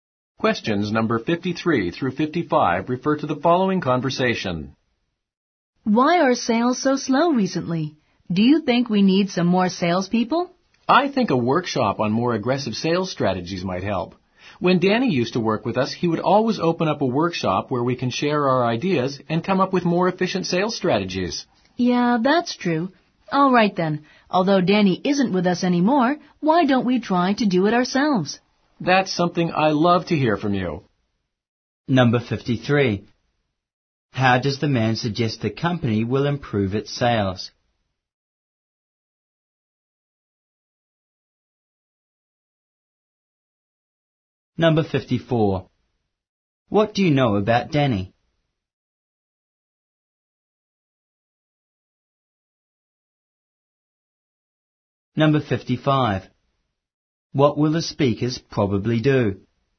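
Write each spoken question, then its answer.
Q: How does the man suggest the company will improve its sales?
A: A workshop on more aggressive sales strategies

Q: What do you know about Danny?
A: He used to work there and held workshops

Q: What will the speakers probably do?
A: Hold a sales workshop themselves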